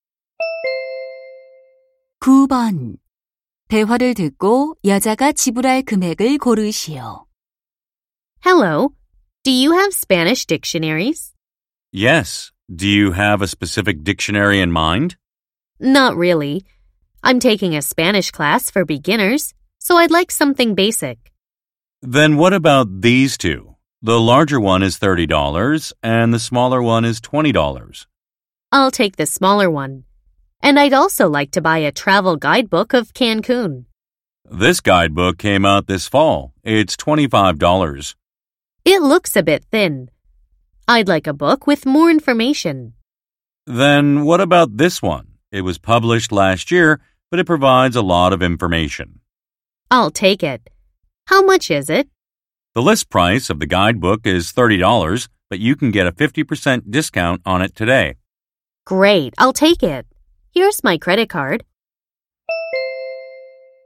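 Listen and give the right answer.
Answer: $35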